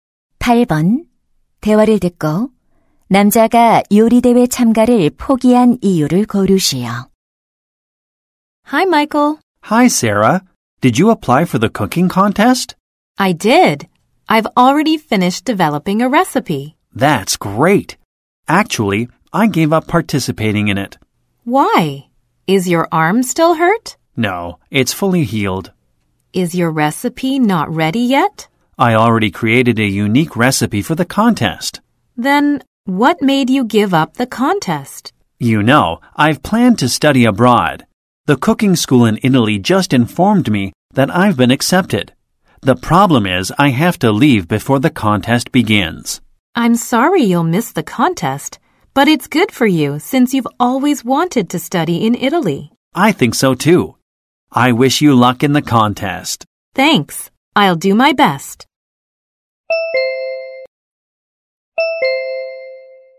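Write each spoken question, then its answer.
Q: 대화를 듣고 남자가 요리대회 참가를 포기한 이유를 고르시오.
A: 이탈리아로 유학을 가야 해서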